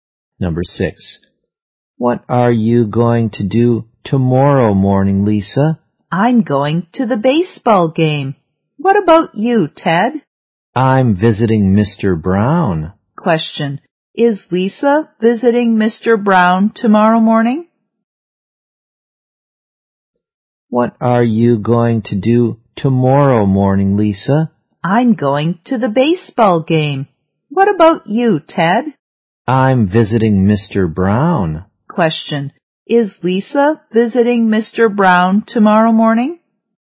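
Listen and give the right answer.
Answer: No, she isn't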